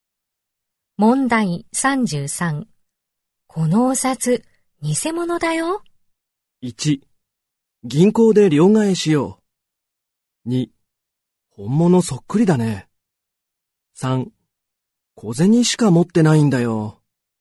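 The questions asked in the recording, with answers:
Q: このお札、偽物だよ。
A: 2: 本物そっくりだね。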